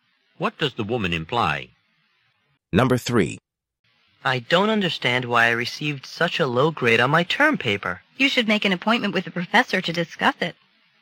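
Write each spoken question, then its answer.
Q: What does the woman suggest the man do?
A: Make an appointment to discuss the grade with the professor.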